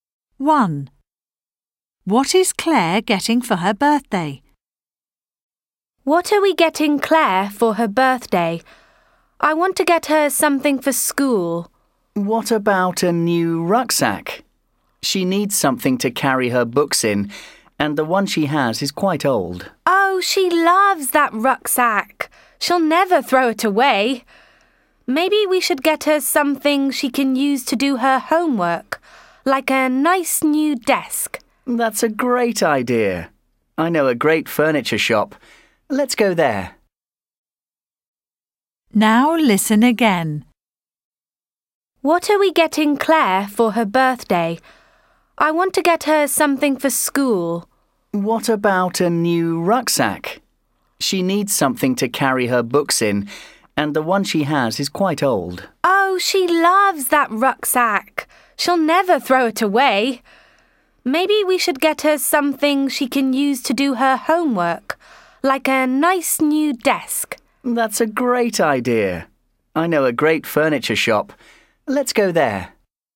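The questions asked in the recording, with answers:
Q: What is Claire getting for her birthday?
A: a new desk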